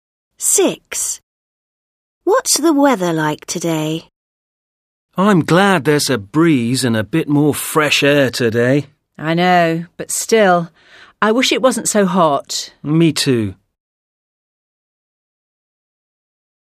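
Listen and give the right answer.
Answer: Hot, with a breeze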